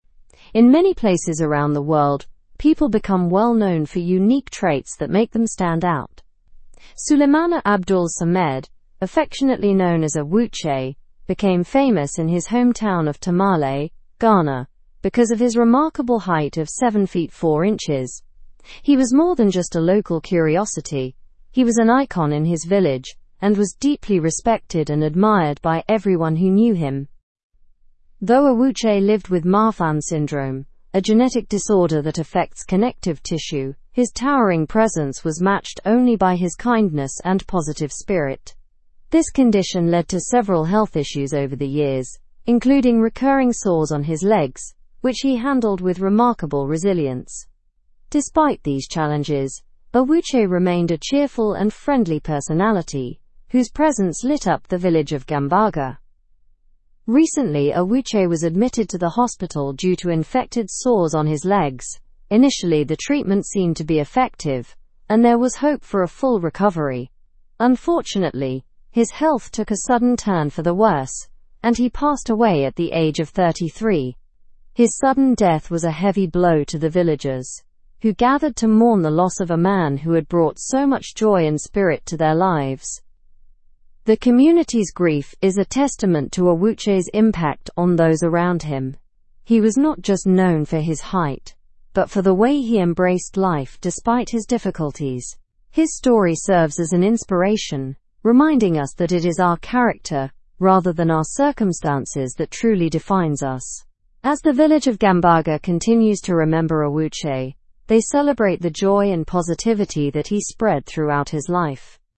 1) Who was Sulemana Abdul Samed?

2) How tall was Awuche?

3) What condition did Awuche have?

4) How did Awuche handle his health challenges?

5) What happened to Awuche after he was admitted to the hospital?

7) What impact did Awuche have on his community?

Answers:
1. Sulemana Abdul Samed, known as Awuche, was a man living in Tamale, Ghana, famous for his height.
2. Awuche was 7 feet 4 inches tall.
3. Awuche had Marfan syndrome, a genetic disorder affecting connective tissue.
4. He handled his health challenges with resilience, maintaining a positive spirit.
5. Awuche was initially responding well to treatment after being hospitalized but unfortunately passed away.
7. Awuche brought joy and spirit to his community, becoming a beloved and inspirational figure.

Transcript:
In many places around the world, people become well-known for unique traits that make them stand out. Sulemana Abdul Samed, affectionately known as Awuche, became famous in his hometown of Tamale, Ghana, because of his remarkable height of 7 feet 4 inches. He was more than just a local curiosity; he was an icon in his village and was deeply respected and admired by everyone who knew him.
Though Awuche lived with Marfan syndrome, a genetic disorder that affects connective tissue, his towering presence was matched only by his kindness and positive spirit. This condition led to several health issues over the years, including recurring sores on his legs, which he handled with remarkable resilience. Despite these challenges, Awuche remained a cheerful and friendly personality whose presence lit up the village of Gambaga.
Recently, Awuche was admitted to the hospital due to infected sores on his legs. Initially, the treatment seemed to be effective, and there was hope for a full recovery. Unfortunately, his health took a sudden turn for the worse, and he passed away at the age of 33. His sudden death was a heavy blow to the villagers, who gathered to mourn the loss of a man who had brought so much joy and spirit to their lives.
The community's grief is a testament to Awuche's impact on those around him. He was not just known for his height, but for the way he embraced life despite his difficulties. His story serves as an inspiration, reminding us that it is our character rather than our circumstances that truly defines us. As the village of Gambaga continues to remember Awuche, they celebrate the joy and positivity that he spread throughout his life.

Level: Level 3